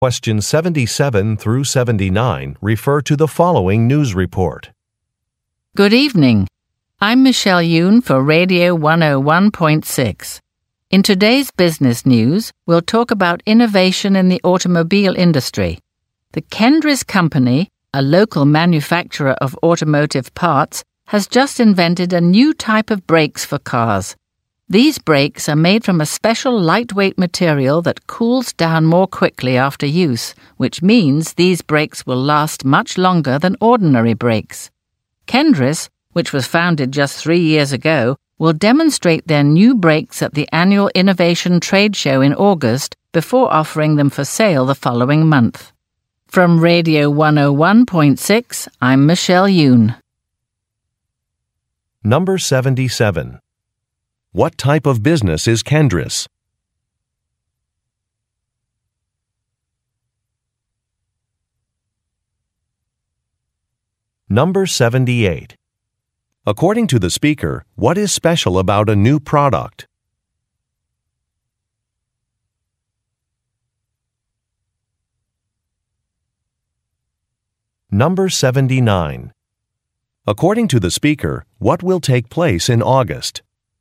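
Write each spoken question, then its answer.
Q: What type of business is Kendris?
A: An automotive parts manufacturer

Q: According to the speaker, what is special about a new product?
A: The brakes last longer because they cool down more quickly

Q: According to the speaker, what will take place in August?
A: A trade show (the annual Innovation Trade Show)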